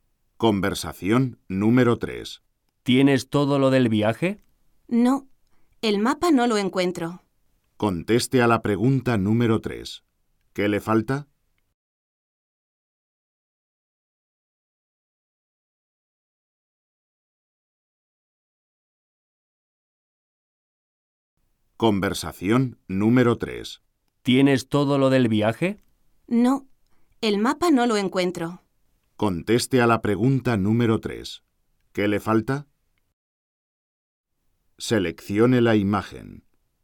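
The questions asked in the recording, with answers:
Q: ¿Qué le falta?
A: El mapa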